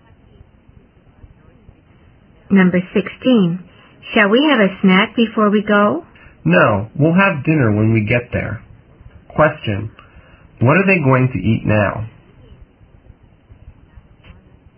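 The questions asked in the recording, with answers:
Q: What are they going to eat now?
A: Nothing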